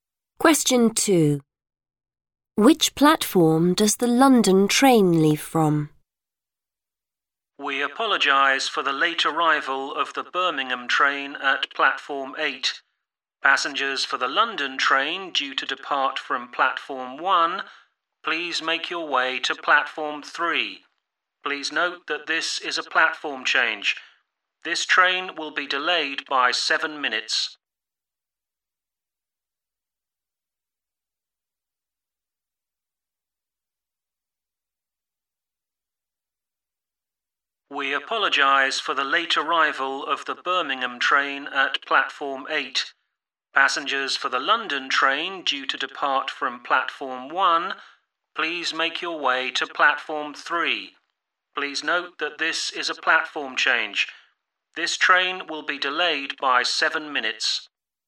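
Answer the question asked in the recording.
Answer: Platform 3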